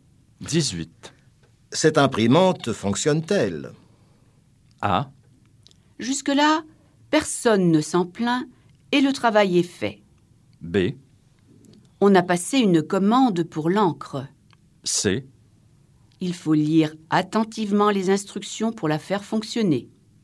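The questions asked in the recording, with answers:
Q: Cette imprimante fonctionne-t-elle?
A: A: Jusque-là, personne ne s'en plaint et le travail est fait.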